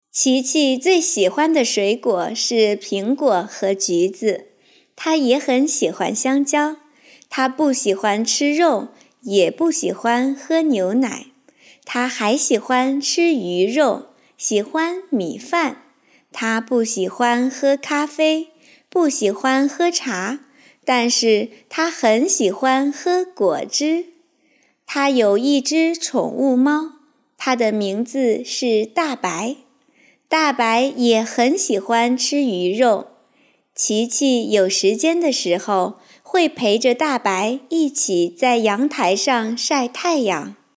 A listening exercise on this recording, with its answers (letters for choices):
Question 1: 琪琪有什么动物?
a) 狗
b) 兔子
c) 金鱼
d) 猫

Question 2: 琪琪喜欢喝咖啡吗?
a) 喜欢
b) 不喜欢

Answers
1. d
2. b

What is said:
琪琪最喜欢的水果是苹果和橘子。她也很喜欢香蕉。她不喜欢吃肉,也不喜欢喝牛奶。她还喜欢吃鱼肉,喜欢米饭。她不喜欢喝咖啡,不喜欢喝茶,但是她很喜欢喝果汁。
大白也很喜欢吃鱼肉。
她还喜欢吃鱼肉,喜欢米饭。她不喜欢喝咖啡,不喜欢喝茶,但是她很喜欢喝果汁。 她有一只宠物猫,它的名字是大白。琪琪有时间的时候,会陪着大白一起在阳台上晒太阳。

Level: beginner